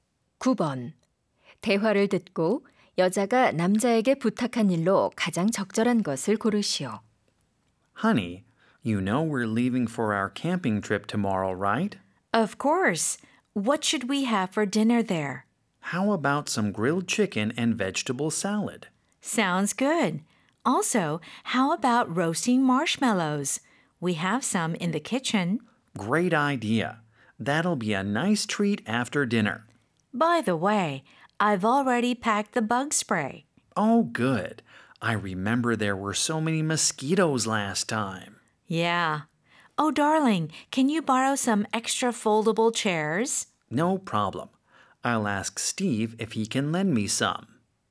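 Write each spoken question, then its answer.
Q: 대화를 듣고 여자가 남자에게 부탁한 일로 가장 적절한 것을 고르시오.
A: 여분의 접이식 의자 빌려 오기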